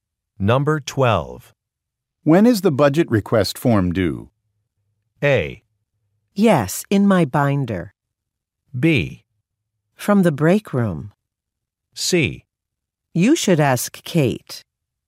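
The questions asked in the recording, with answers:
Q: When is the budget request form due?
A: C: You should ask Kate.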